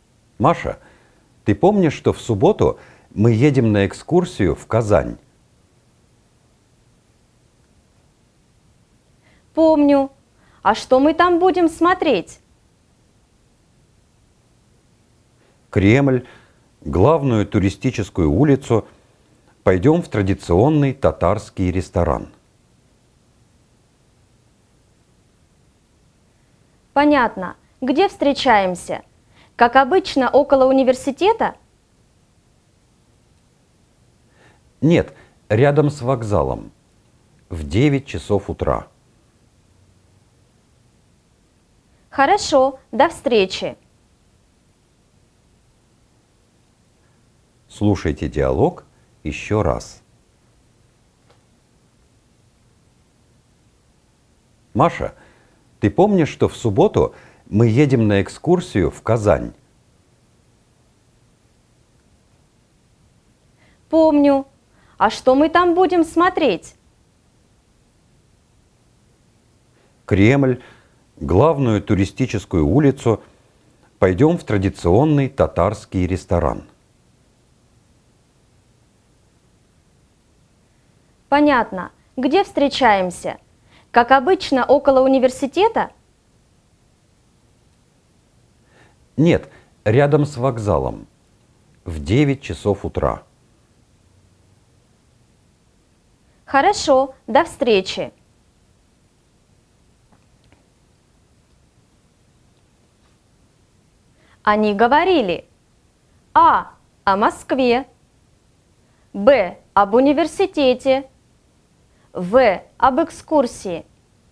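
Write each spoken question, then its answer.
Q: Они говорили: а. о Москве, б. об университете, в. об экскурсии.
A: В: об экскурсии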